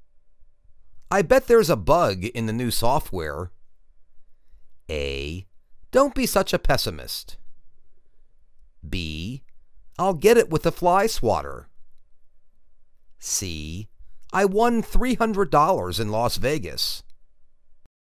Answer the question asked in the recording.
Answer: Don't be such a pessimist.